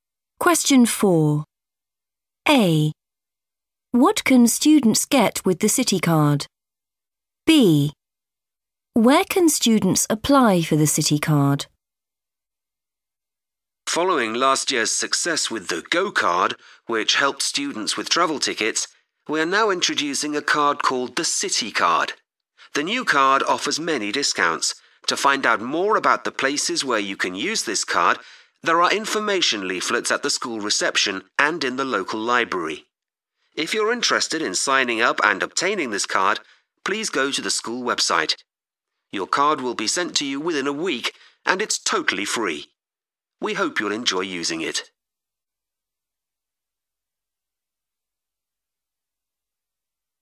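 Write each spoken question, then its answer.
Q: What can students get with the City Card?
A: discounts

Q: Where can students apply for the City Card?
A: the school website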